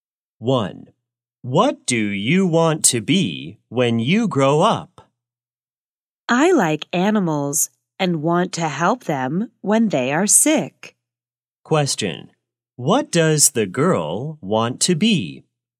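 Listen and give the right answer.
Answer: A vet (animal doctor)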